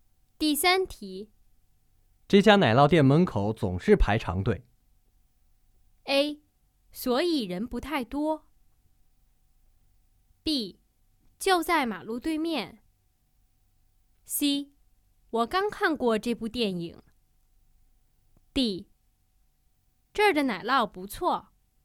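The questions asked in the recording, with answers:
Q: 这家奶酪店门口总是排长队。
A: D: 这儿的奶酪不错。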